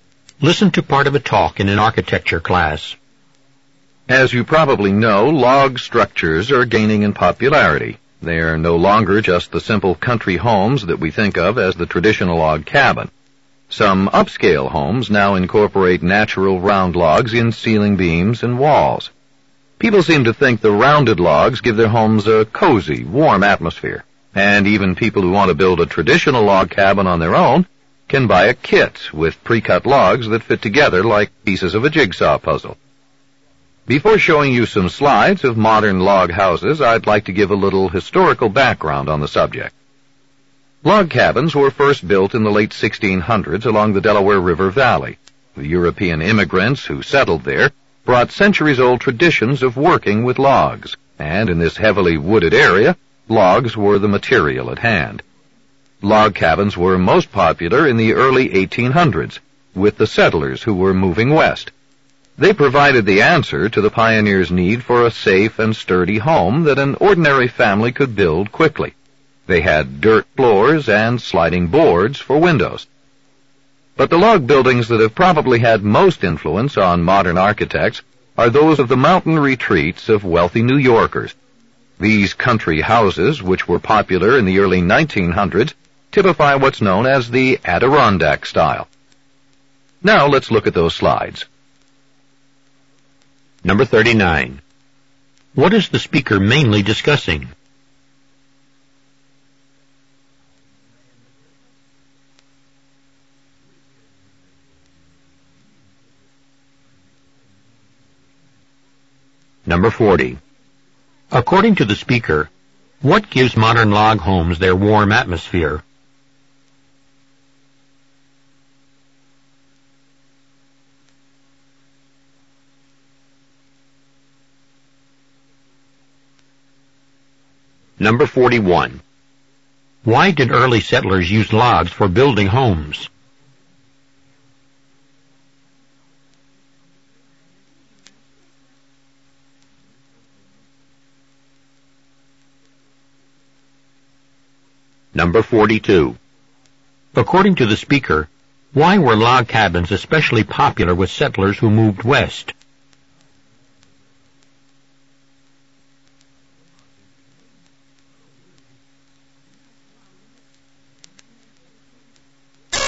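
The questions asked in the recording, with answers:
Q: What is the speaker mainly discussing?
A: Log structures/log houses and their history

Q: According to the speaker, what gives modern log homes their warm atmosphere?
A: Natural round logs

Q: Why did early settlers use logs for building homes?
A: Logs were the material at hand in the heavily wooded area, and they had traditions of working with logs

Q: According to the speaker, why were log cabins especially popular with settlers who moved west?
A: An ordinary family could build a safe, sturdy home quickly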